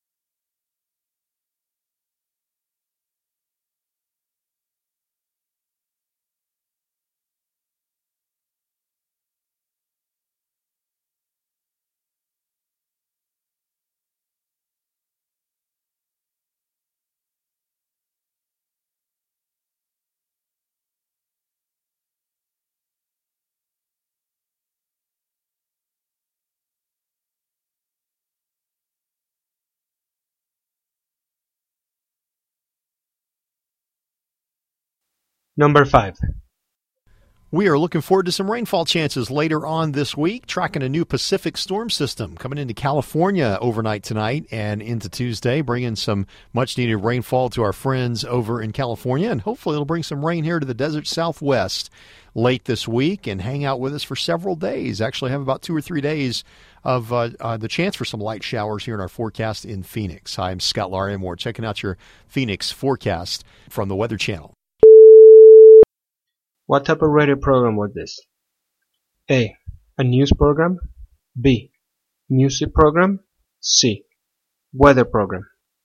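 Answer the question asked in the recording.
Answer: C: Weather program.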